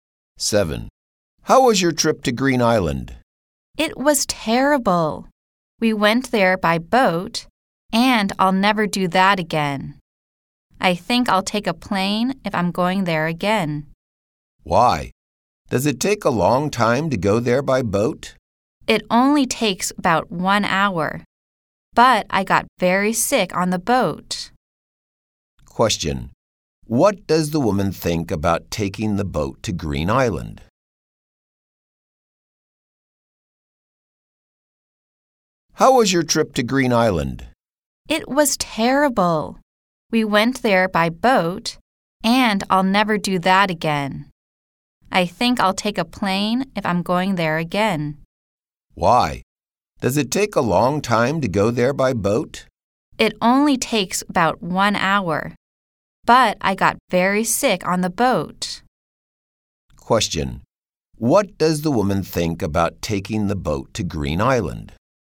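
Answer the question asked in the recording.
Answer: It was terrible; she got very sick on the boat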